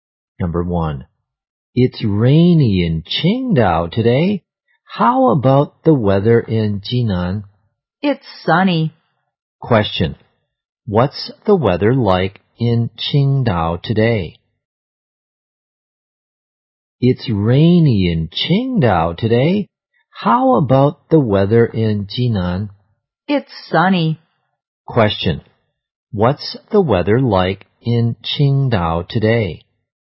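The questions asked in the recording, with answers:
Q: what's the weather like in Qingdao today?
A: Rainy.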